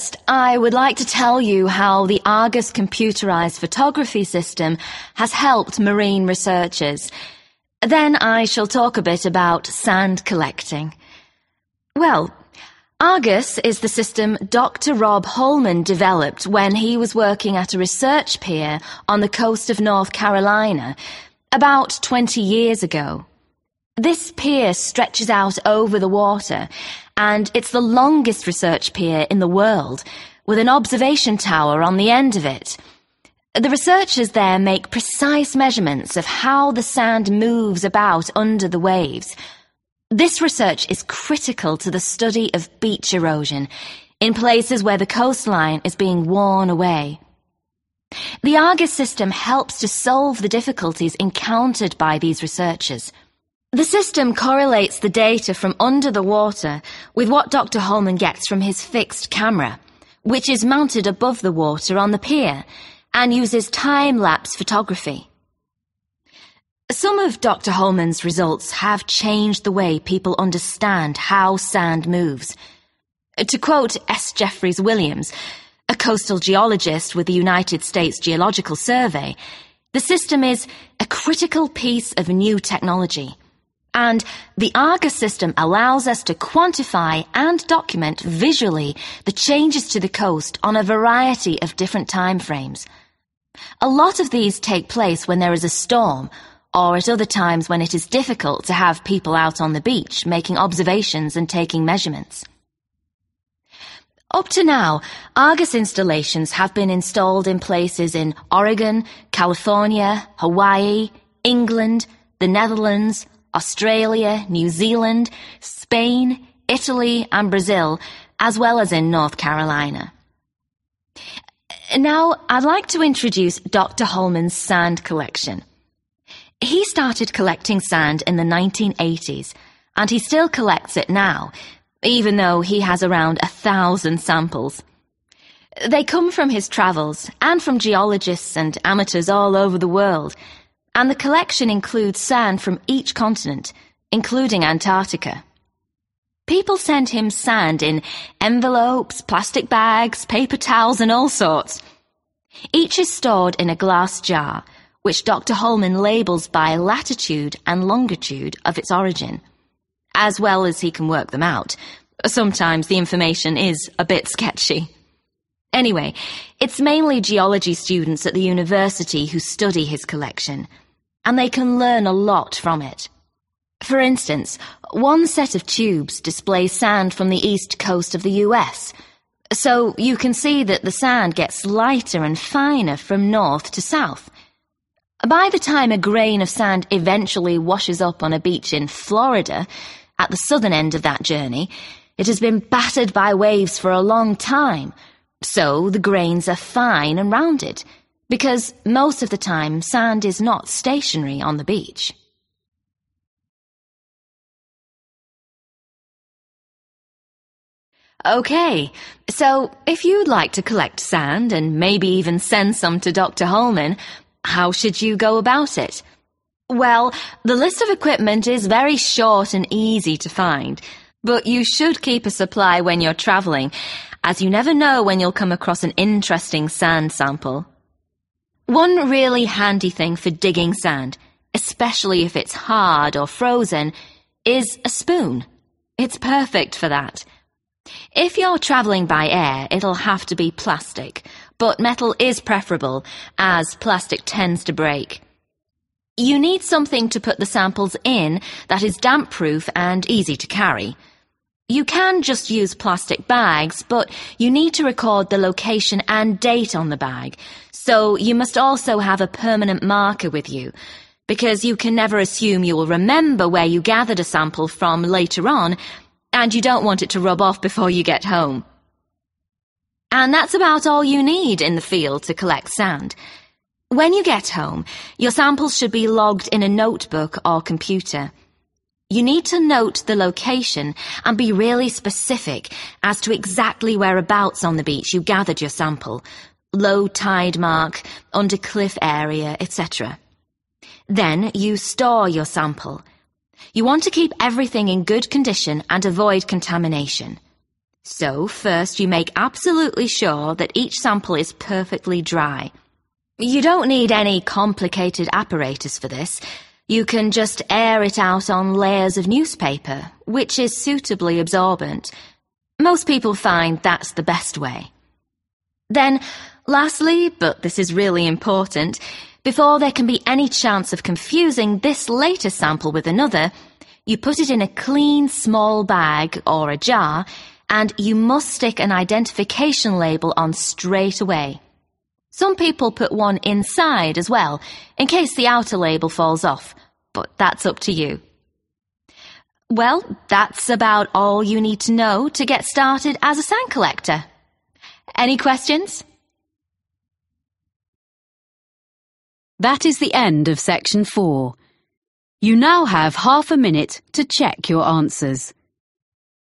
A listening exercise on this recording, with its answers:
Complete the notes below. Write NO MORE THAN TWO WORDS for each answer.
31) Research is vital for understanding of 31 _______________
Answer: beach erosion

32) Matches information from under the water with information from 32 _______________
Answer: fixed camera

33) According to S. Jeffress Williams, useful because can make observations during a 33 _______________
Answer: storm

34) Dr H. has samples from every 34 _______________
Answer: continent

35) Used in teaching students of 35 _______________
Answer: geology

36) e.g. US East Coast display: grains from south are small, light-coloured and 36 _______________ in shape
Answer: rounded

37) to dig sand, a plastic or metal 37 _______________ is ideal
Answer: spoon

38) write date and place, using a 38 _______________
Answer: permanent marker

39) dry sample on 39 _______________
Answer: newspaper

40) add at least one 40 _______________ immediately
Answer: identification label